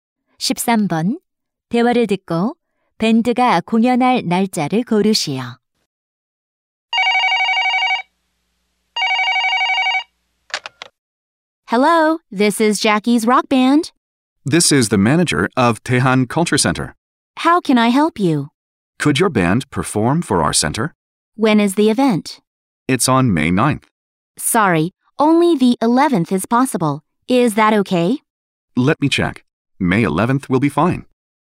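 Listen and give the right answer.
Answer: 5월 11일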